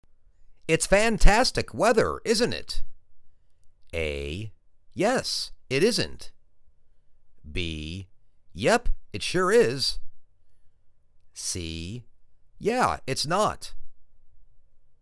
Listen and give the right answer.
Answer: Yep, it sure is!